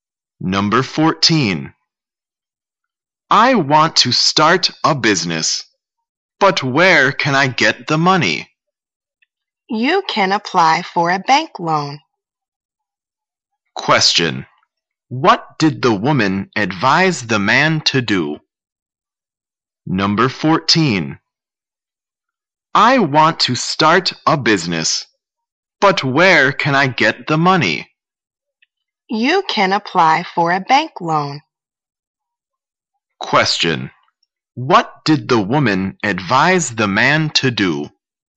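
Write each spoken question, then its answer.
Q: What did the woman advise the man to do?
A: Apply for a bank loan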